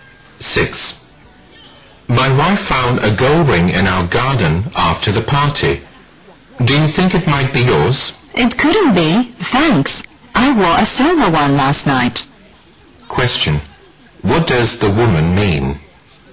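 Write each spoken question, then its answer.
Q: What does the woman mean?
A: The ring is not hers; she wore a silver one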